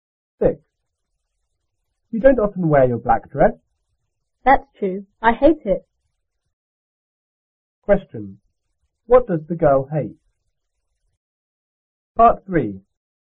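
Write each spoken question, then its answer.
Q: What does the girl hate?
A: Her black dress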